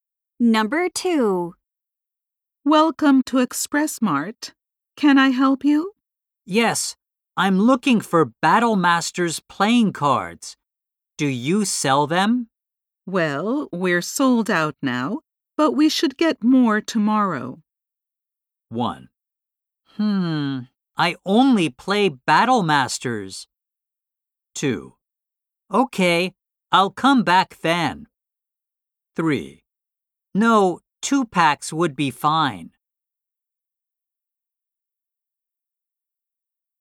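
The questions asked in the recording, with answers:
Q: Well, we're sold out now, but we should get more tomorrow.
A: 2: Okay, I'll come back then.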